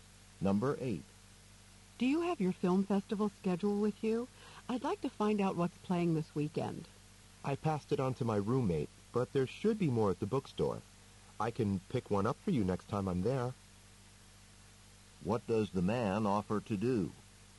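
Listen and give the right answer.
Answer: Pick up a film festival schedule for her at the bookstore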